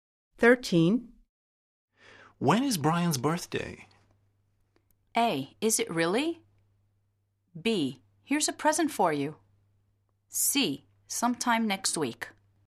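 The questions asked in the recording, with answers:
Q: When is Brian's birthday?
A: C: Sometime next week.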